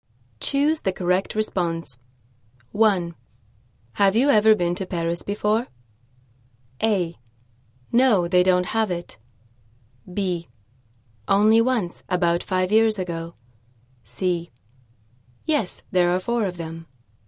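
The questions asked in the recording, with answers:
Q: Have you ever been to Paris before?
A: B: Only once, about 5 years ago.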